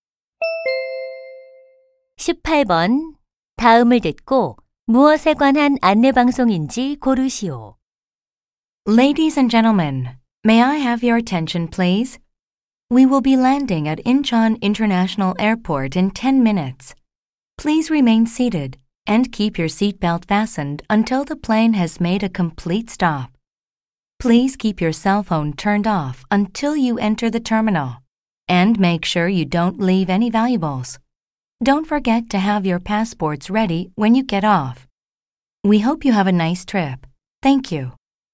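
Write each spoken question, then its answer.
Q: 다음을 듣고 무엇에 관한 안내 방송인지 고르시오.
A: 비행기 착륙 안내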